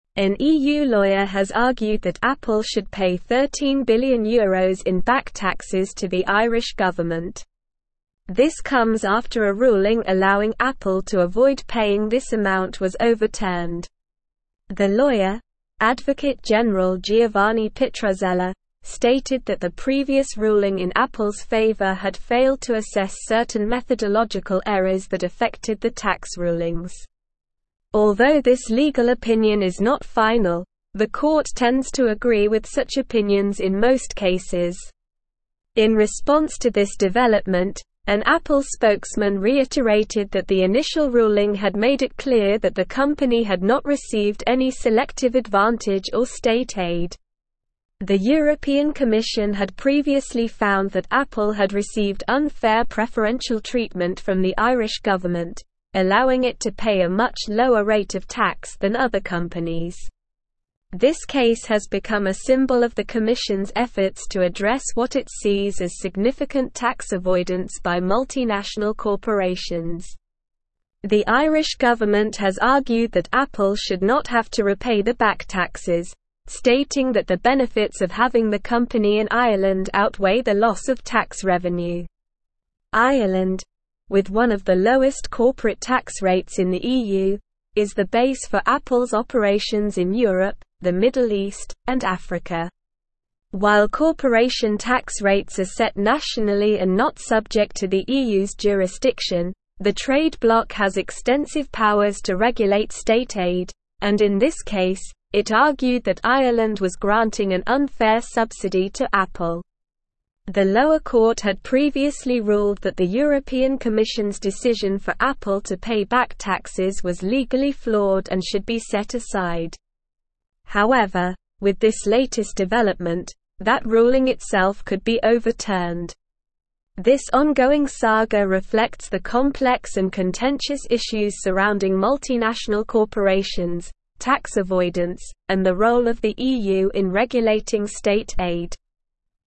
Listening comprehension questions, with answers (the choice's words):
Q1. What is the amount of back taxes that the EU lawyer argues Apple should pay to the Irish government?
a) €5 million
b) €20 billion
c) €13 billion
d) €8 billion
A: €13 billion

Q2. What is the name of the lawyer who argued that Apple should pay back taxes to the Irish government?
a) Advocate General Giovanni Pitruzzella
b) Attorney General Maria Rossi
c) Advocate General Antonio Bianchi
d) Attorney General Sofia Romano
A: Advocate General Giovanni Pitruzzella

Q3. What did the European Commission find regarding Apple's tax treatment by the Irish government?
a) Apple had paid the correct amount of taxes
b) Apple had overpaid taxes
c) Apple had received unfair preferential treatment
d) Apple had not paid any taxes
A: Apple had received unfair preferential treatment

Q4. What is the basis for Apple's operations in Europe, the Middle East, and Africa?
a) Germany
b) Ireland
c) France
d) Spain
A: Ireland

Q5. What is the argument of the Irish government regarding Apple's back taxes?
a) Apple should immediately repay the full amount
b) Apple should pay even more in back taxes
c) The Irish government has not made any statement regarding Apple's back taxes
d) The benefits of having the company in Ireland outweigh the loss of tax revenue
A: The benefits of having the company in Ireland outweigh the loss of tax revenue

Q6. What is the main issue addressed by the European Commission in this case?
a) Unfair treatment of small businesses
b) Significant tax avoidance by multinational corporations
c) Environmental regulations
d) Labor laws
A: Significant tax avoidance by multinational corporations

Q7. What is the main reason for the lower corporate tax rates in Ireland compared to other EU countries?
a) The EU's jurisdiction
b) The European Commission's regulations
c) The Irish government's unfair subsidies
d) Ireland's national tax policy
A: Ireland's national tax policy

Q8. What was the ruling of the lower court regarding the European Commission's decision for Apple to pay back taxes?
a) It was legally flawed and should be set aside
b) It was fair and just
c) It was overturned by the EU court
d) It was not addressed in the article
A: It was legally flawed and should be set aside

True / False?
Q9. The court tends to disagree with the legal opinions of Advocate General Giovanni Pitruzzella in most cases.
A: False

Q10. The previous ruling in Apple's favor was overturned due to methodological errors that affected the tax rulings.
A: True

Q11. Ireland, with one of the highest corporate tax rates in the EU, is not the base for Apple's operations in Europe, the Middle East, and Africa.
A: False

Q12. An EU lawyer has argued that Apple should not pay €13 billion in back taxes to the Irish government.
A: False

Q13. An EU lawyer has argued that Apple should pay €13 billion in back (1)______ to the Irish government.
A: taxes

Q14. The lawyer, Advocate General Giovanni Pitruzzella, stated that the previous ruling in Apple's favor had failed to assess certain methodological errors that (2)______ the tax rulings.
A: affected

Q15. Although this legal (3)______ is not final, the (4)______ tends to agree with such opinions in most cases.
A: court

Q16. In response to this development, an (5)______ spokesman reiterated that the initial ruling had made it clear that the company had not received any selective (6)______ or state aid.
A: Apple

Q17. In response to this development, an (5)______ spokesman reiterated that the initial ruling had made it clear that the company had not received any selective (6)______ or state aid.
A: advantage

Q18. The (7)______ Commission had previously found that Apple had received unfair preferential treatment from the Irish government, allowing it to pay a much lower rate of tax than other companies.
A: European

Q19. This case has become a symbol of the Commission's efforts to address what it sees as significant tax (8)______ by multinational corporations.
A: avoidance

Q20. The Irish (9)______ has (10)______ that Apple should not have to repay the back taxes, stating that the benefits of having the company in Ireland outweigh the loss of tax revenue.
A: government

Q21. The Irish (9)______ has (10)______ that Apple should not have to repay the back taxes, stating that the benefits of having the company in Ireland outweigh the loss of tax revenue.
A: argued

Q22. While corporation tax rates are set nationally and not subject to the EU's (11)______, the trade bloc has (12)______ powers to regulate state aid, and in this case, it argued that Ireland was granting an unfair subsidy to Apple.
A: jurisdiction

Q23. While corporation tax rates are set nationally and not subject to the EU's (11)______, the trade bloc has (12)______ powers to regulate state aid, and in this case, it argued that Ireland was granting an unfair subsidy to Apple.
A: extensive

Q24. The (13)______ court had previously (14)______ that the European Commission's decision for Apple to pay back taxes was legally flawed and should be set aside.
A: lower

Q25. The (13)______ court had previously (14)______ that the European Commission's decision for Apple to pay back taxes was legally flawed and should be set aside.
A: ruled

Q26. However, with this (15)______ development, that ruling itself could be (16)______.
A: latest

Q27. However, with this (15)______ development, that ruling itself could be (16)______.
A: overturned

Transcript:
An EU lawyer has argued that Apple should pay €13 billion in back taxes to the Irish government. This comes after a ruling allowing Apple to avoid paying this amount was overturned. The lawyer, Advocate General Giovanni Pitruzzella, stated that the previous ruling in Apple's favor had failed to assess certain methodological errors that affected the tax rulings. Although this legal opinion is not final, the court tends to agree with such opinions in most cases.
In response to this development, an Apple spokesman reiterated that the initial ruling had made it clear that the company had not received any selective advantage or state aid. The European Commission had previously found that Apple had received unfair preferential treatment from the Irish government, allowing it to pay a much lower rate of tax than other companies. This case has become a symbol of the Commission's efforts to address what it sees as significant tax avoidance by multinational corporations.
The Irish government has argued that Apple should not have to repay the back taxes, stating that the benefits of having the company in Ireland outweigh the loss of tax revenue. Ireland, with one of the lowest corporate tax rates in the EU, is the base for Apple's operations in Europe, the Middle East, and Africa. While corporation tax rates are set nationally and not subject to the EU's jurisdiction, the trade bloc has extensive powers to regulate state aid, and in this case, it argued that Ireland was granting an unfair subsidy to Apple.
The lower court had previously ruled that the European Commission's decision for Apple to pay back taxes was legally flawed and should be set aside. However, with this latest development, that ruling itself could be overturned. This ongoing saga reflects the complex and contentious issues surrounding multinational corporations, tax avoidance, and the role of the EU in regulating state aid.

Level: Level 4